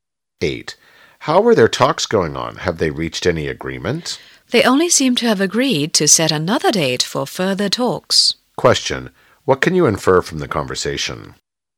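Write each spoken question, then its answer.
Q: What can you infer from the conversation?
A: The talks reached no real agreement, only a date for more talks.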